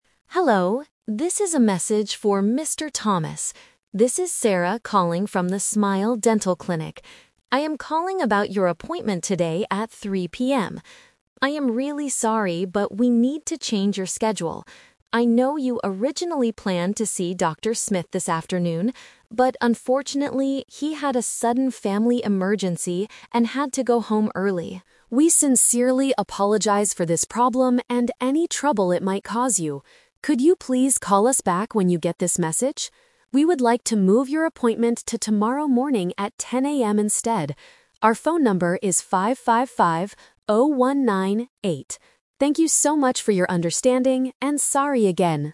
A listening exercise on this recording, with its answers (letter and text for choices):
Listen to the voicemail and choose the correct answer (A, B, or C).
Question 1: Why is Sarah calling Mr. Thomas?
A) To change the time of his appointment.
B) To cancel his appointment completely.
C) To remind him to pay his dental bill.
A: A) To change the time of his appointment.

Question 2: Why can't Mr. Thomas see the dentist today?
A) Because Mr. Thomas is feeling sick.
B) Because the clinic is closed for a holiday.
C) Because the dentist had to go home early.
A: C) Because the dentist had to go home early.

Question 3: When does the clinic want Mr. Thomas to come?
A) Today at 3:00 PM.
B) Tomorrow at 10:00 AM.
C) Tomorrow at 3:00 PM.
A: B) Tomorrow at 10:00 AM.

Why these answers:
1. Sarah says, "we need to change your schedule" and later asks to "move your appointment to tomorrow". Trap: Option (B) is a trap. The appointment is not cancelled completely; it is just moved to a new time. Option (C) is a common reason for clinics to call, but money/bills are not mentioned.
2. Sarah explains the reason: "he (Dr. Smith) had a sudden family emergency and had to go home early." Trap: Option (A) is a trap. Sometimes patients cancel because they are sick, but in this situation, it is the doctor who has the problem, not Mr. Thomas. Option (B) is not mentioned.
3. Sarah suggests a new time: "We would like to move your appointment to tomorrow morning at 10:00 AM instead." Trap: Option (A) is the "Expectation vs. Reality" trap. 3:00 PM today was the original plan, not the new plan. Option (C) mixes the day (tomorrow) with the old time (3:00 PM).

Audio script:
Receptionist: Hello, this is a message for Mr. Thomas. This is Sarah calling from the Smile Dental Clinic. I am calling about your appointment today at 3:00 PM. I am really sorry, but we need to change your schedule. I know you originally planned to see Dr. Smith this afternoon, but unfortunately, he had a sudden family emergency and had to go home early. We sincerely apologize for this problem and any trouble it might cause you. Could you please call us back when you get this message? We would like to move your appointment to tomorrow morning at 10:00 AM instead. Our phone number is 555-0198. Thank you so much for your understanding, and sorry again!

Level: A2